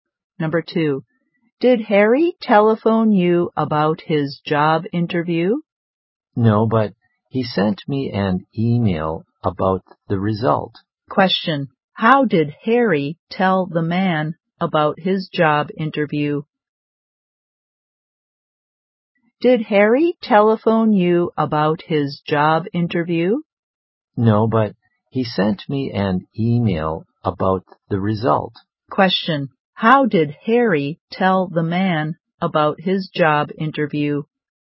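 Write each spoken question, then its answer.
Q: how did Harry tell the man about his job interview?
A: By email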